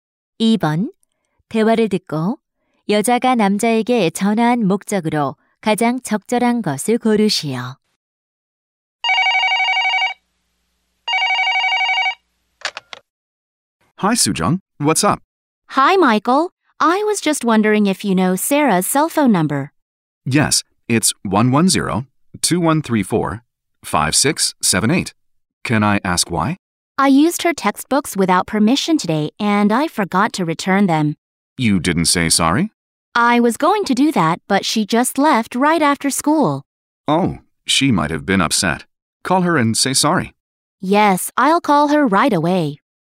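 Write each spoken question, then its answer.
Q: 대화를 듣고 여자가 남자에게 전화한 목적으로 가장 적절한 것을 고르시오.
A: Sarah의 휴대전화 번호를 물어보려고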